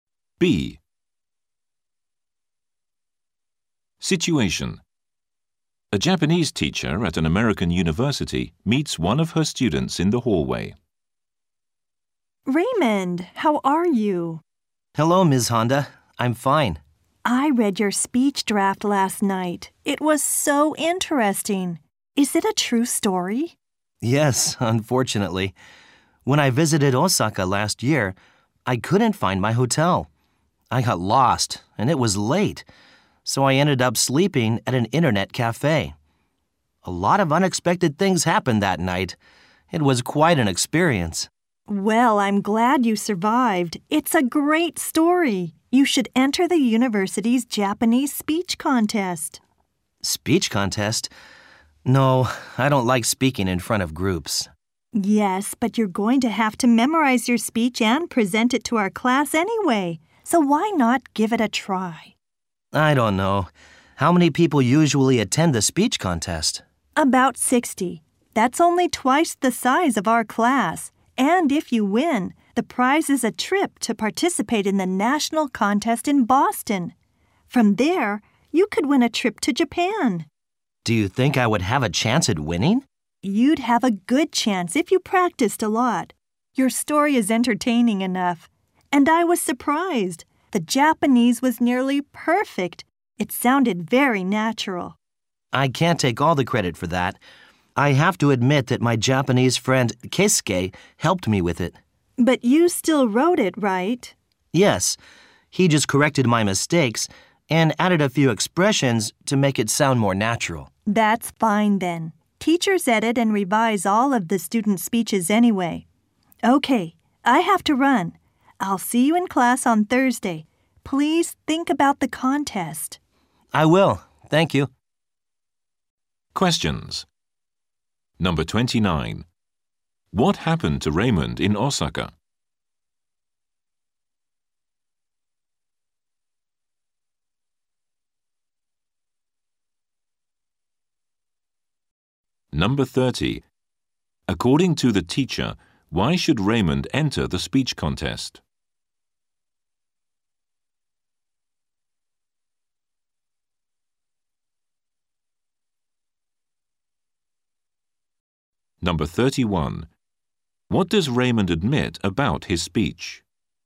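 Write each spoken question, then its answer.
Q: What happened to Raymond in Osaka?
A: He got lost and slept at an internet cafe.

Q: According to the teacher, why should Raymond enter the speech contest?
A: His story is entertaining and he could win a trip.

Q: What does Raymond admit about his speech?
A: His Japanese friend helped correct it.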